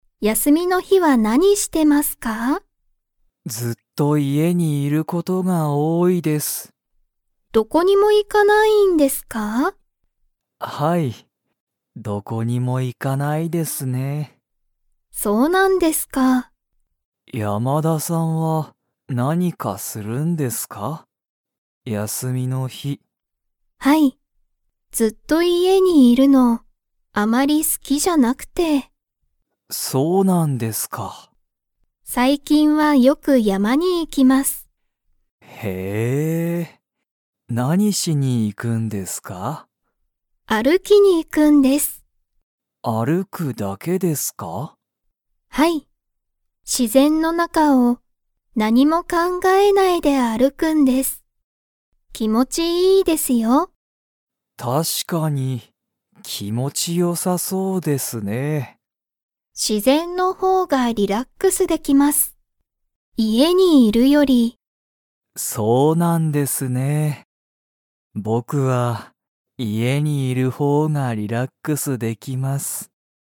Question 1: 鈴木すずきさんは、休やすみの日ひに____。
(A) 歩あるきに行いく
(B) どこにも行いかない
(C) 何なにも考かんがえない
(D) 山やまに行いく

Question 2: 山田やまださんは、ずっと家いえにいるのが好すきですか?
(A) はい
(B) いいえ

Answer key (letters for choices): 1B, 2B

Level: Level 2